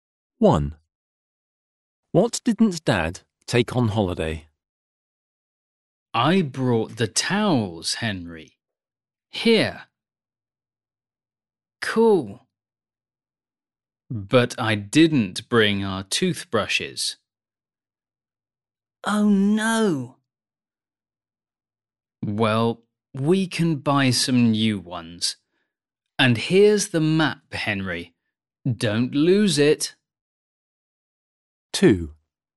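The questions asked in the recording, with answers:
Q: What didn't Dad take on holiday?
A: toothbrushes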